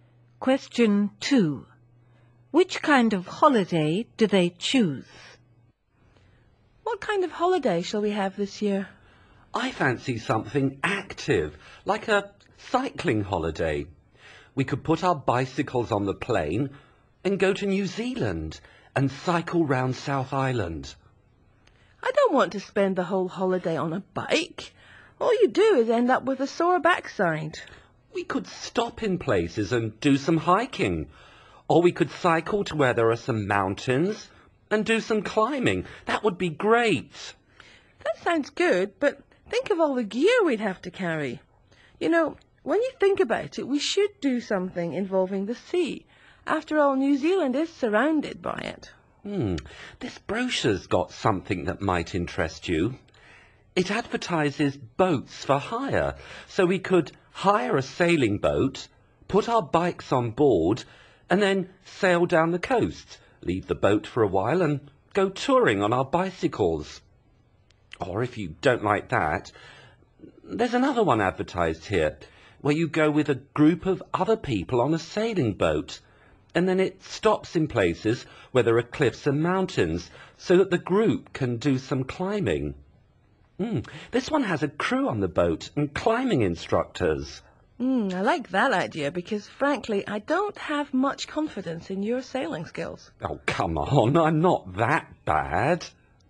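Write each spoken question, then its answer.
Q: Which kind of holiday do they choose?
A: A group sailing trip with a crew that stops so they can go climbing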